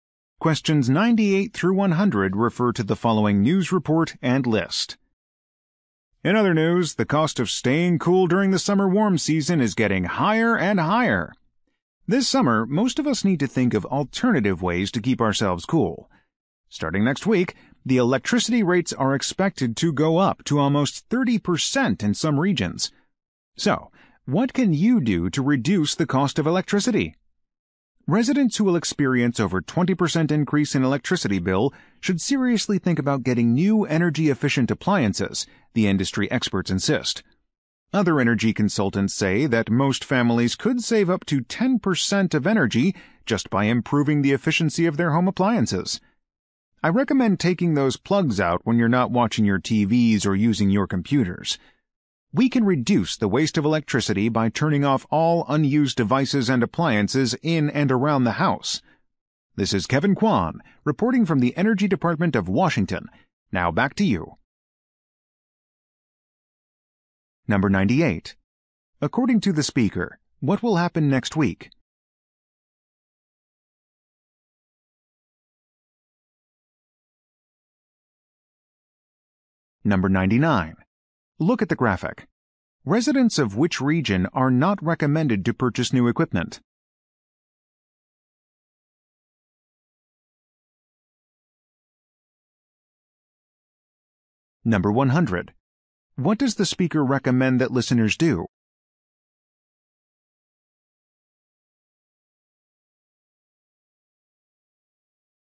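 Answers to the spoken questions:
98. Electricity rates will go up
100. Unplug and turn off unused devices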